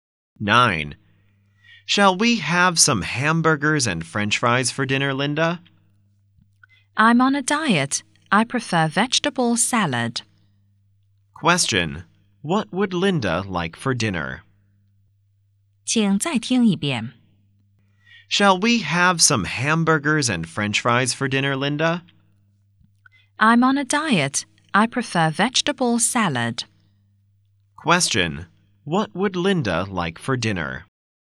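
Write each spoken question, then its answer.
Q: What would Linda like for dinner?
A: Vegetable salad.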